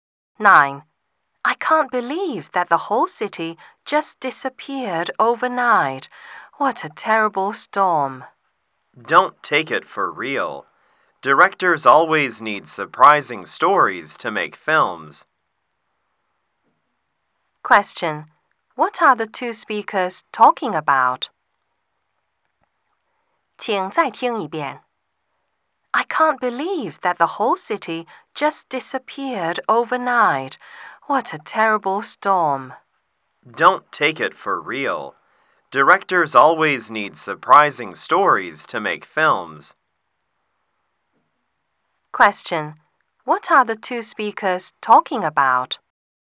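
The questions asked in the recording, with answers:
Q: What are the two speakers talking about?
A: A film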